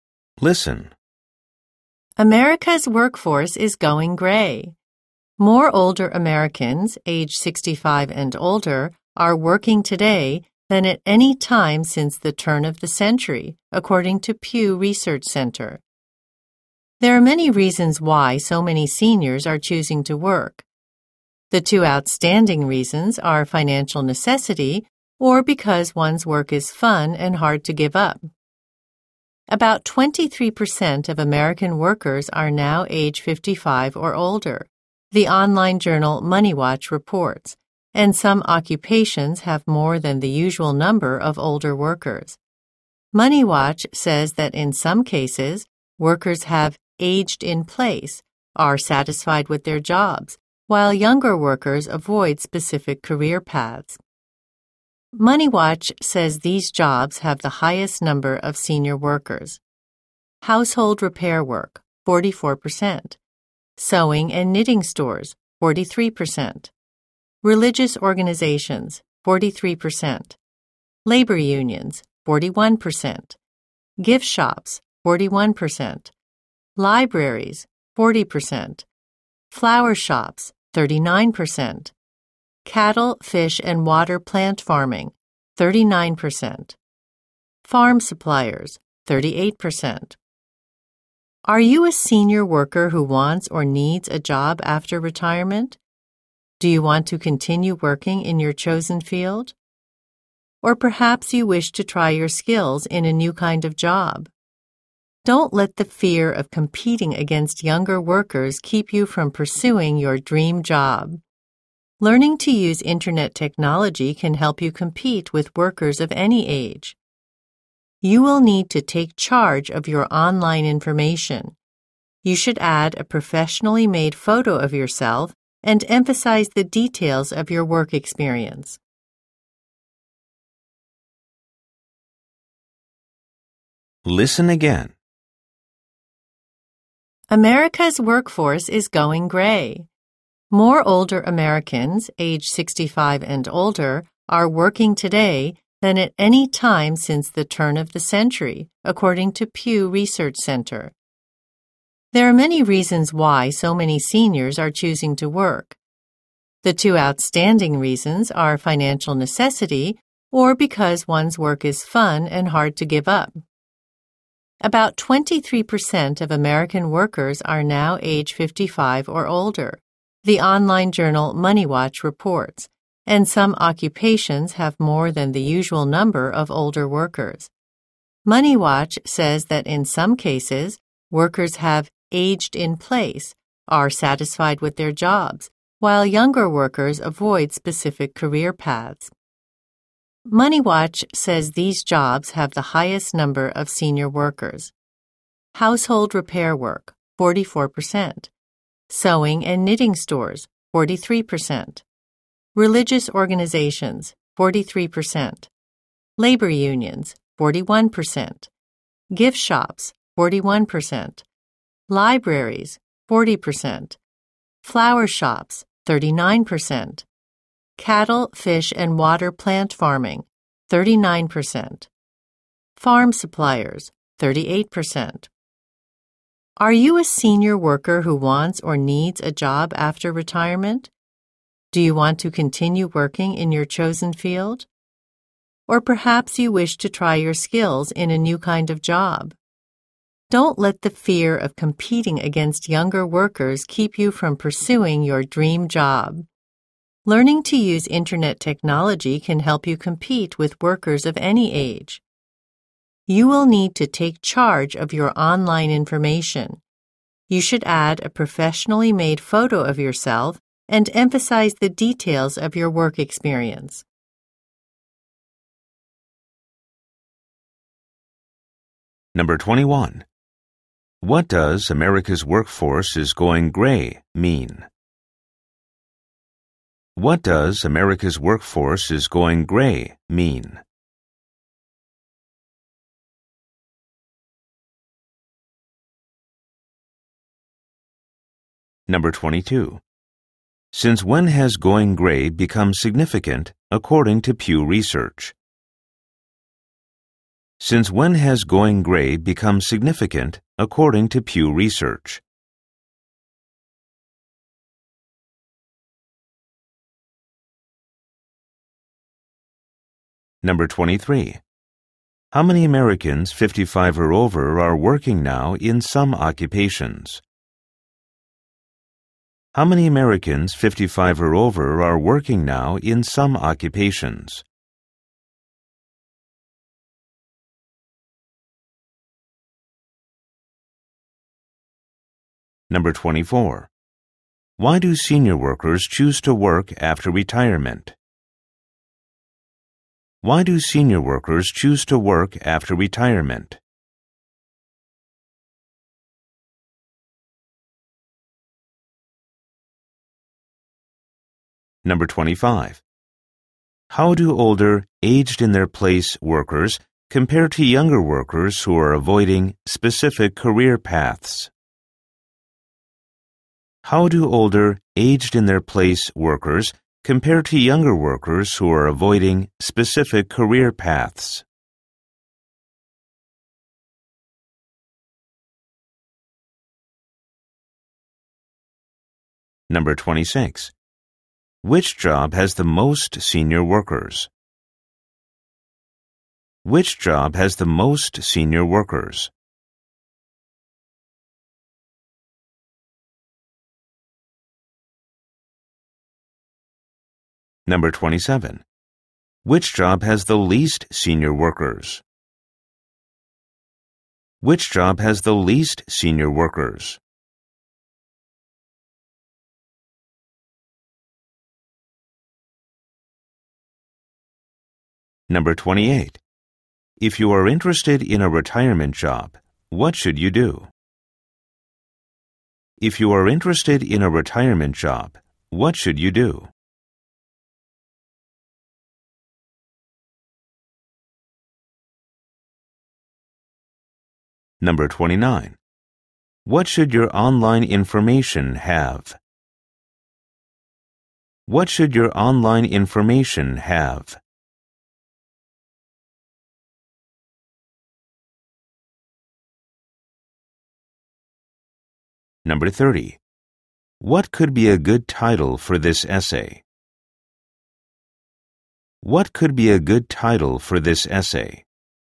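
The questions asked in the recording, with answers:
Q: What does America's workforce is going gray mean?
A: More older people are working.

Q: Since when has going gray become significant according to Pew Research?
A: Since the turn of the century

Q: Why do senior workers choose to work after retirement?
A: They need the money, or they enjoy their work and find it hard to give up.

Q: How do older, aged-in-their-place workers compare to younger workers who are avoiding specific career paths?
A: The older workers are satisfied with their jobs, while younger workers avoid those careers.

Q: Which job has the most senior workers?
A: Household repair work (44%)

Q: Which job has the least senior workers?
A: Farm suppliers (38%)

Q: What should your online information have?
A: A professionally made photo and details of your work experience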